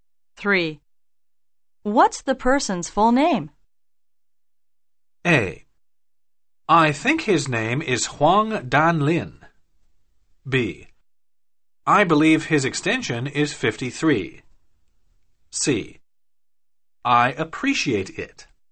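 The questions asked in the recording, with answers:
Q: What's the person's full name?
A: A: I think his name is Huang Danlin.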